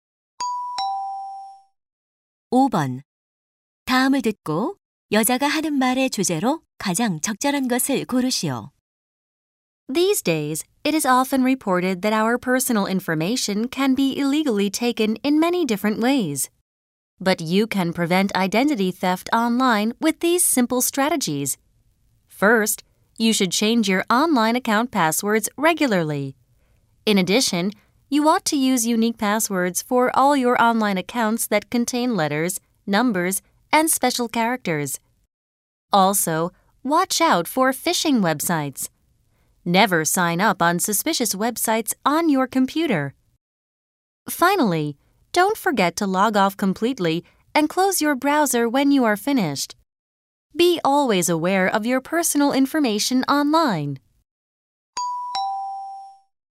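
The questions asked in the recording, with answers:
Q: 다음을 듣고 여자가 하는 말의 주제로 가장 적절한 것을 고르시오.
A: 온라인 개인정보 도용을 막는 방법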